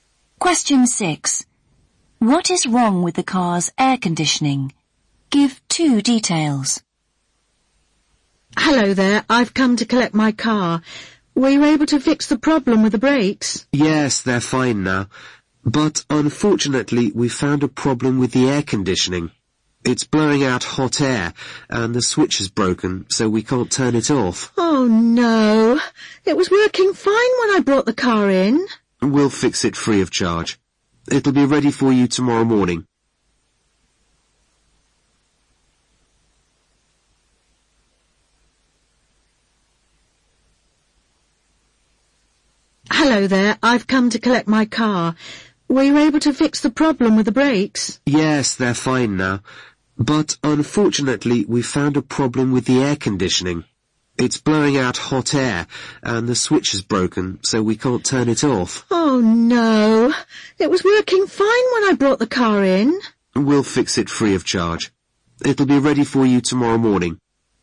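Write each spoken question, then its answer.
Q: What is wrong with the car's air conditioning?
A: It blows out hot air and the switch is broken, so it can't be turned off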